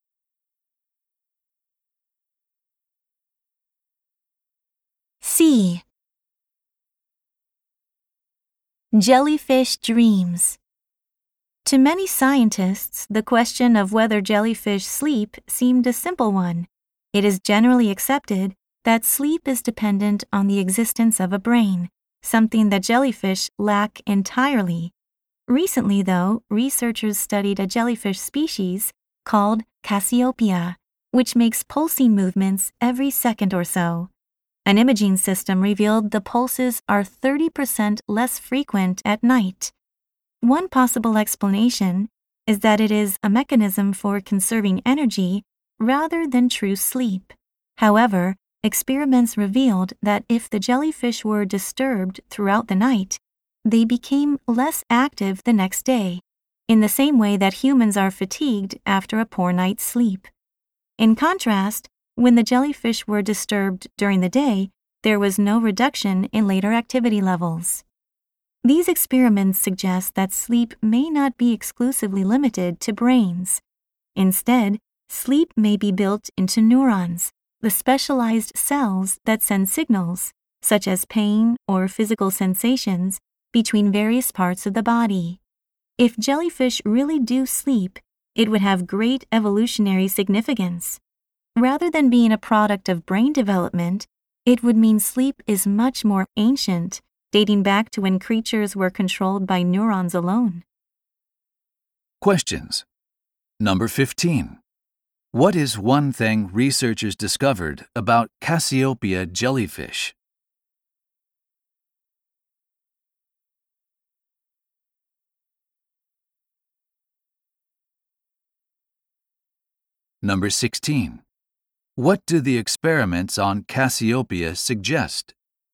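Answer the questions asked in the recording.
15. Their pulses are 30% less frequent at night, and if disturbed at night they are less active the next day.
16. Sleep may be built into neurons rather than depending on a brain.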